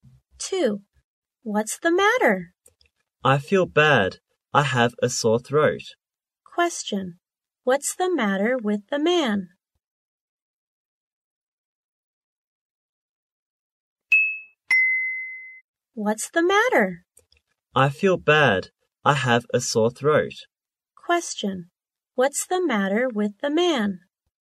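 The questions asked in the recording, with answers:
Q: What's the matter with the man?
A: He has a sore throat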